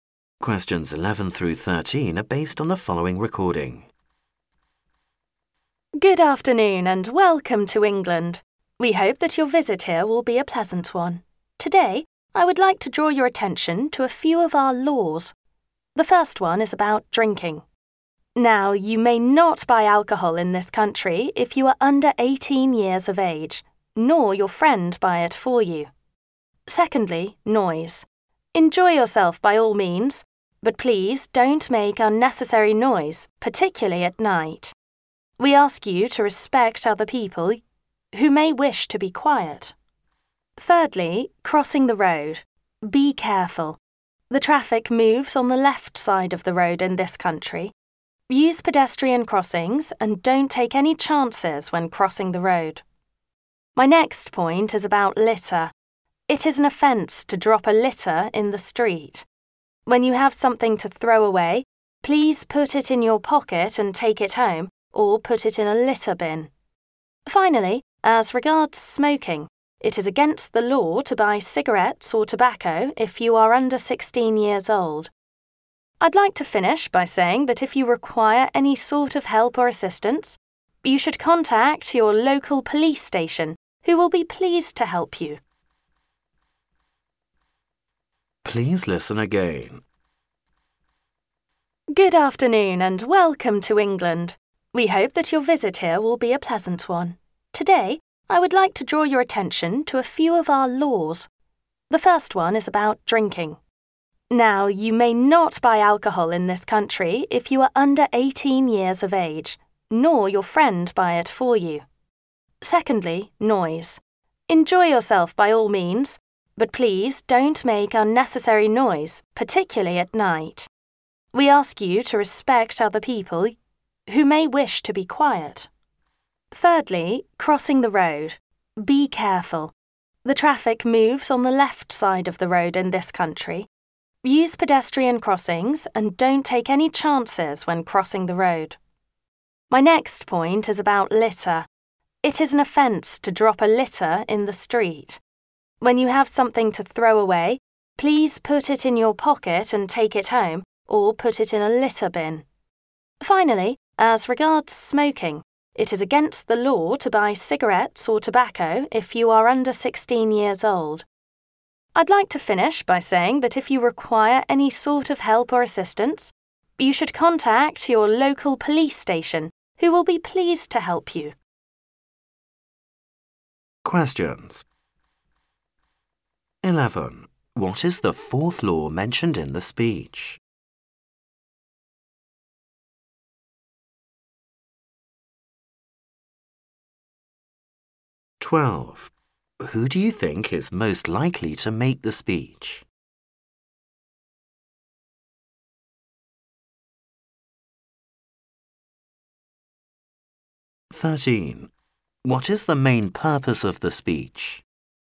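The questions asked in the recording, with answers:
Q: What is the fourth law mentioned in the speech?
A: Not dropping litter in the street

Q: What is the main purpose of the speech?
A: To tell visitors about some laws in England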